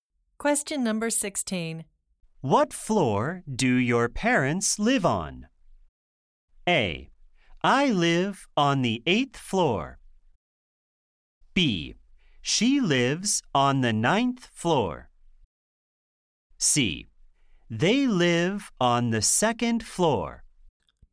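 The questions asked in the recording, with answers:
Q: What floor do your parents live on?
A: C: They live on the 2nd floor.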